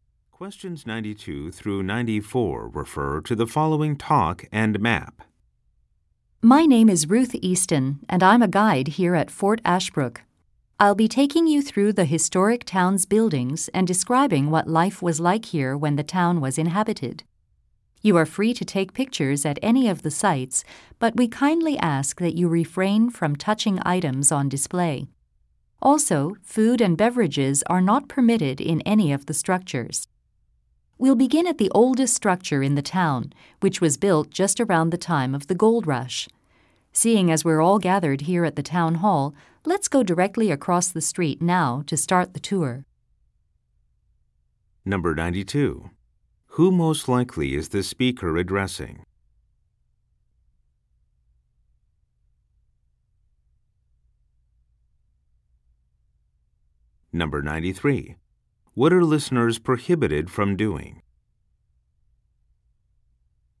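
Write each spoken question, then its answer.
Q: Who most likely is the speaker addressing?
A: Tourists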